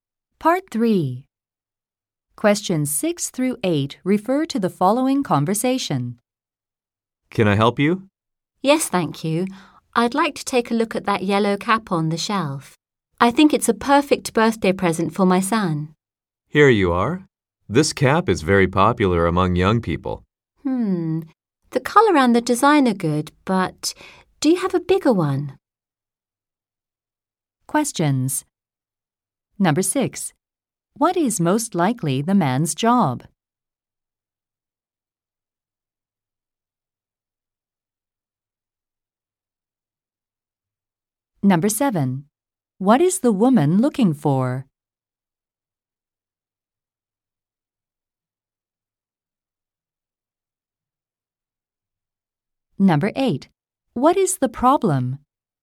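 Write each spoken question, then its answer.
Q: What is the woman looking for?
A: A birthday present for her son (a yellow cap)

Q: What is the problem?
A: The cap is too small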